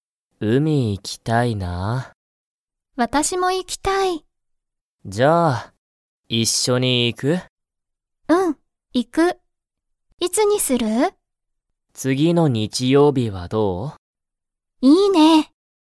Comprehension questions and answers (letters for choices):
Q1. ナオキとリカは、____海うみに行いく。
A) 今日きょう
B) 次つぎの日曜日にちようび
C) 毎日まいにち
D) この前まえ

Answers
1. B

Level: Level 1